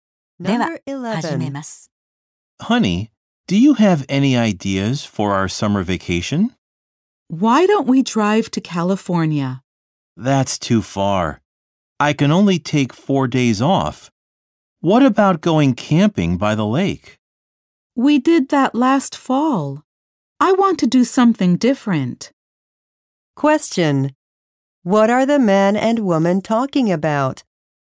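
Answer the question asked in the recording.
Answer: Their summer vacation plans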